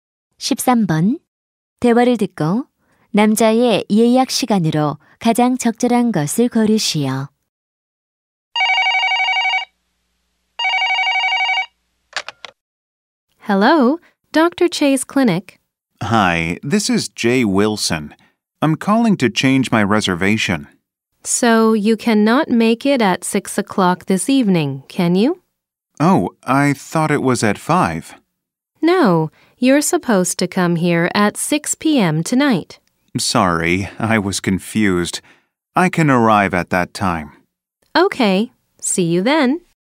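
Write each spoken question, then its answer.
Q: 대화를 듣고 남자의 예약 시간으로 가장 적절한 것을 고르시오.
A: 오후 6시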